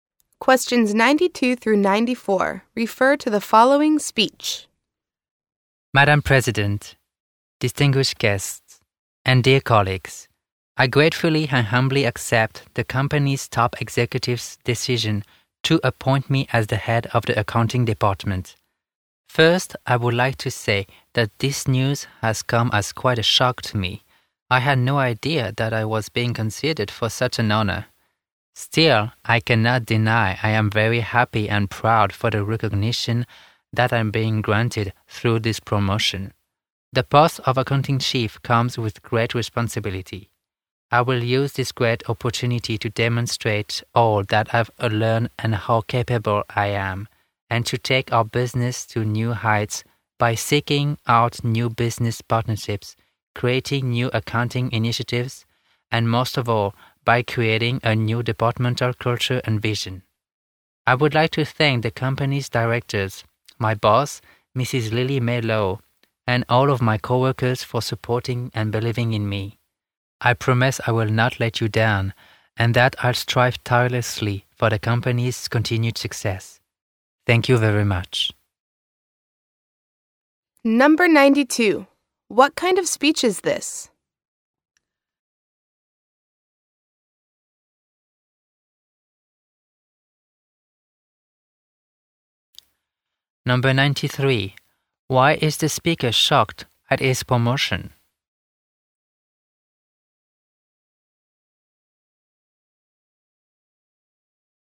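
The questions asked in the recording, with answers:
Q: What kind of speech is this?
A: A speech accepting a promotion

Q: Why is the speaker shocked at his promotion?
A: He had no idea he was being considered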